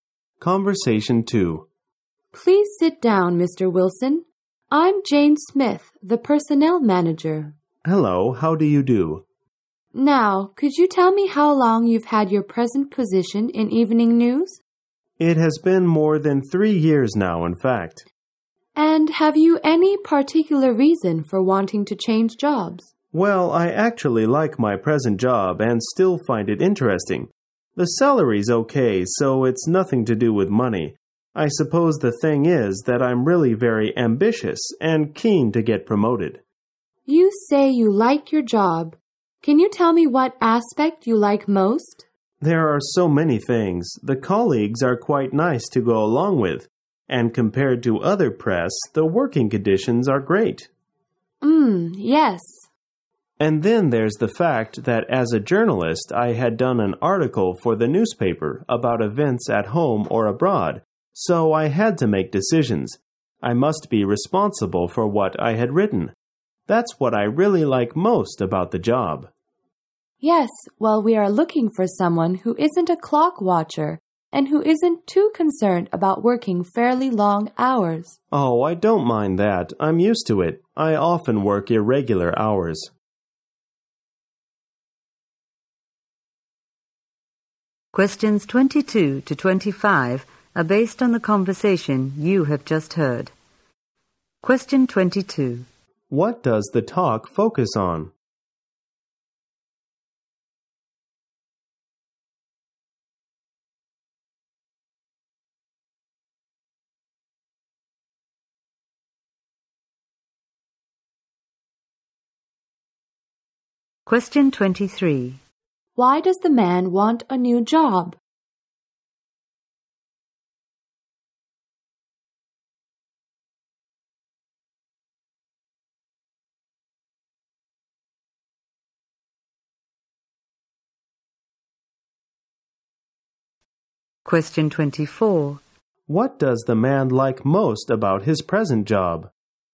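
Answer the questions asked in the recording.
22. A job interview
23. He is ambitious and wants promotion
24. Making decisions and being responsible for what he writes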